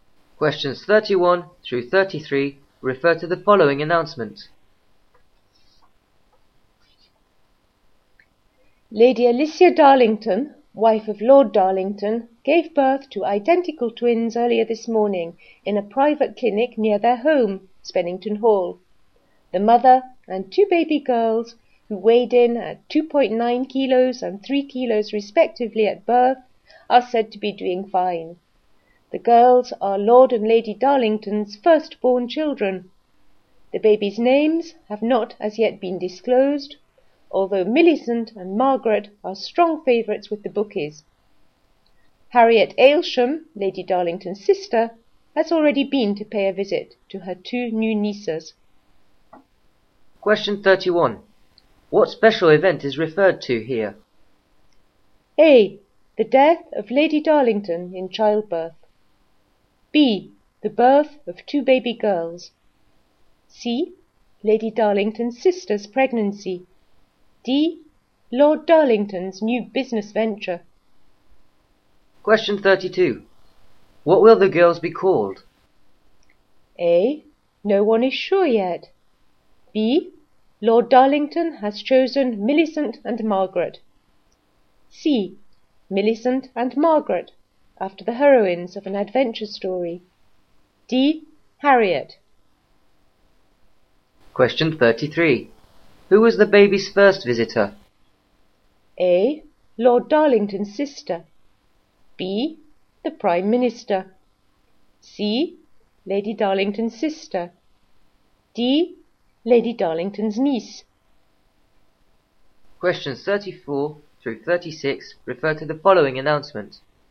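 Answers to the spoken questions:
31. B: The birth of two baby girls.
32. A: No one is sure yet.
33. C: Lady Darlington's sister.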